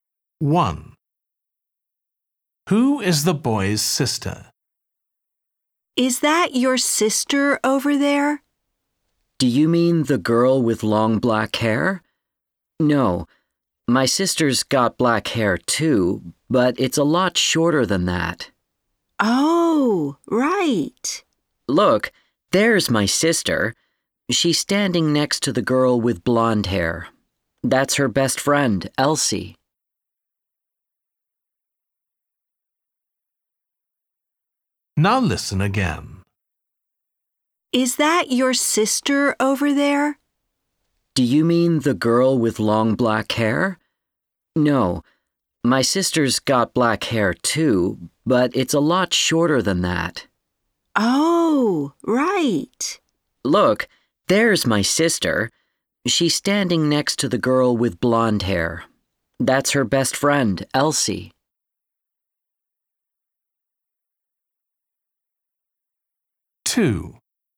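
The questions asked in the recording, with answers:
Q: Who is the boy's sister?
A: The girl with short black hair standing next to the girl with blonde hair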